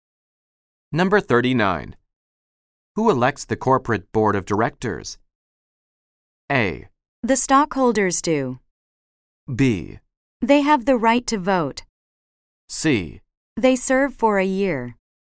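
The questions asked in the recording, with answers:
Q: Who elects the corporate board of directors?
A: A: The stockholders do.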